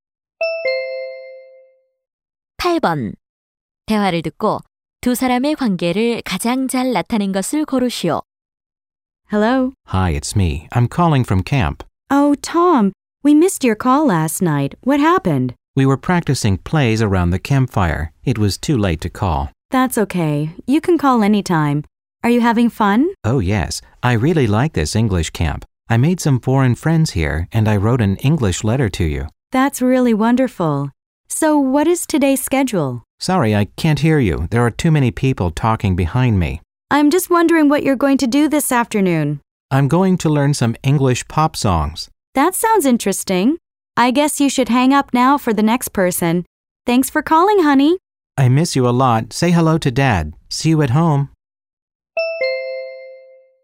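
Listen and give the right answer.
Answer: 엄마와 아들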